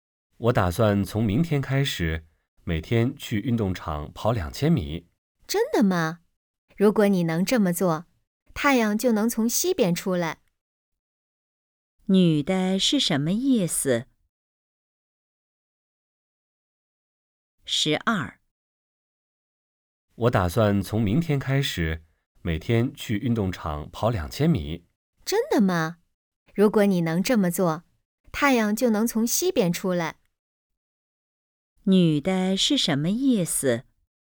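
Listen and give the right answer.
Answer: 她不相信男的能做到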